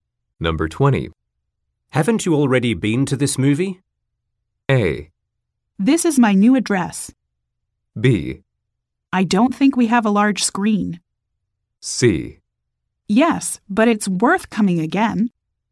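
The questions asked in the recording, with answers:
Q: Haven't you already been to this movie?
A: C: Yes, but it's worth coming again.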